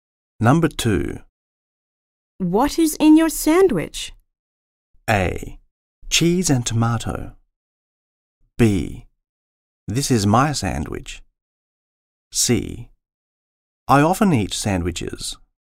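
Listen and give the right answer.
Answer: A: Cheese and tomato.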